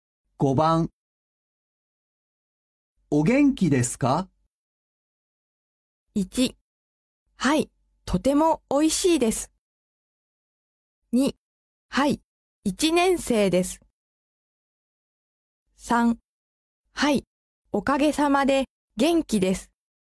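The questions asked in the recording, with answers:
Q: お元気ですか?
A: 3: はい、おかげさまで元気です。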